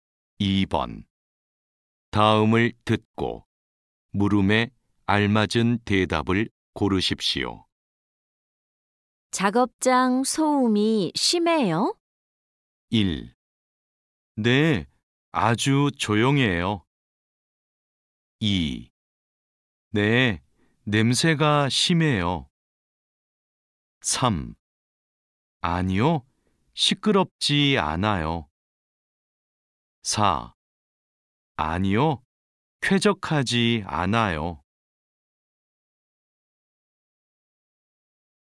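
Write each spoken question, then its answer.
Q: 작업장 소음이 심해요?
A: 3: 아니요, 시끄럽지 않아요.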